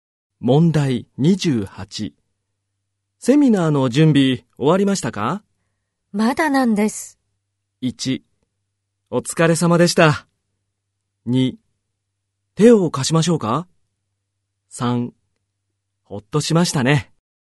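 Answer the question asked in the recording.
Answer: 2: 手を貸しましょうか?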